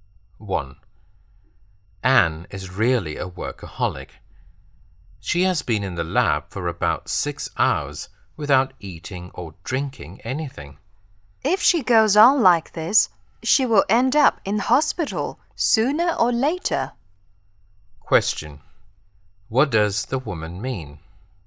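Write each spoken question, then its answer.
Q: What does the woman mean?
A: Anne will get ill if she keeps working without eating or drinking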